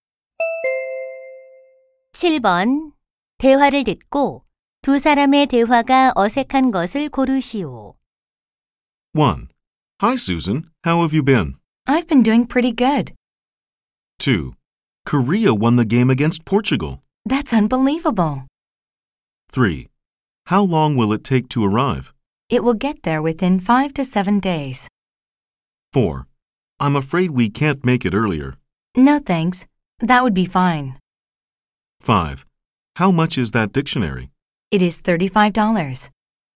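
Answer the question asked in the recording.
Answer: 4: I'm afraid we can't make it earlier. / No thanks, that would be fine.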